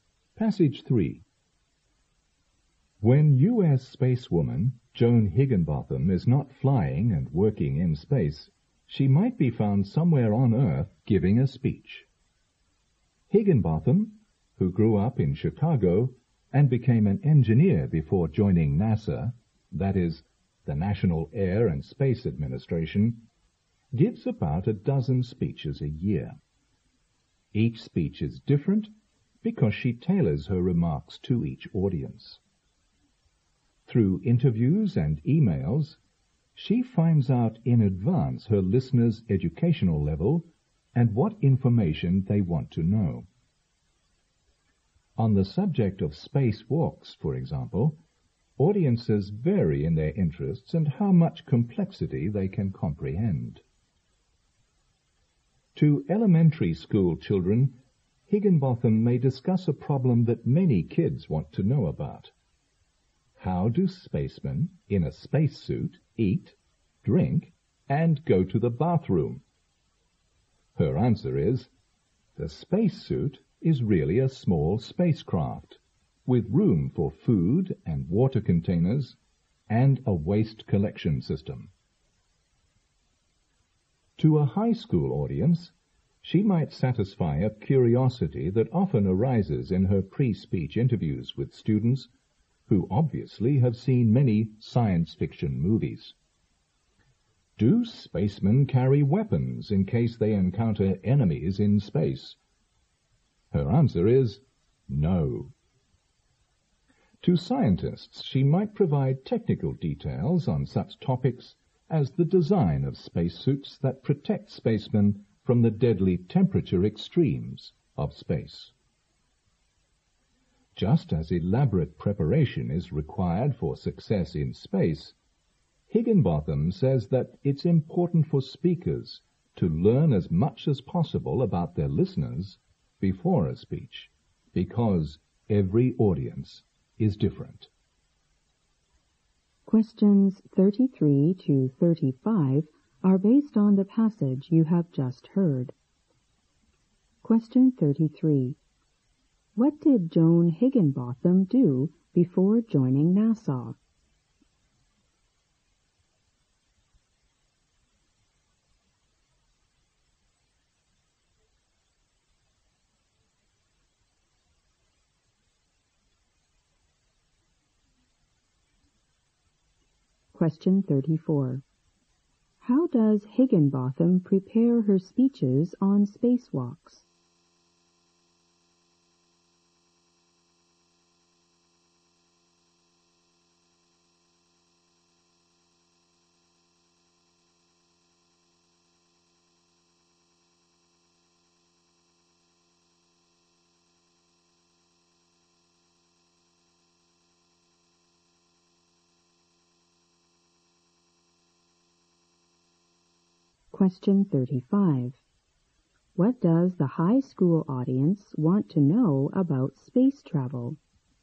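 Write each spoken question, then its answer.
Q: What did Joan Higginbotham do before joining NASA?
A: She was an engineer.

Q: How does Higginbotham prepare her speeches on spacewalks?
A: She uses interviews and emails to learn about her audience beforehand and tailors each speech to them.

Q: What does the high school audience want to know about space travel?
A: Whether spacemen carry weapons in case they meet enemies in space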